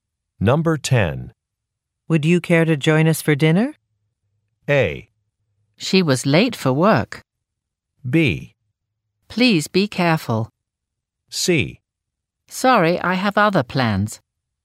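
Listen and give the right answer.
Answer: C: Sorry, I have other plans.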